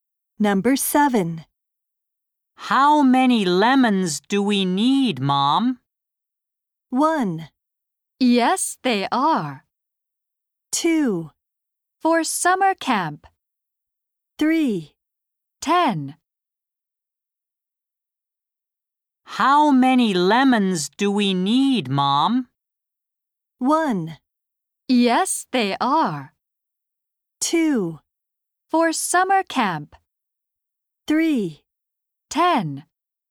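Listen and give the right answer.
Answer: 3: 10.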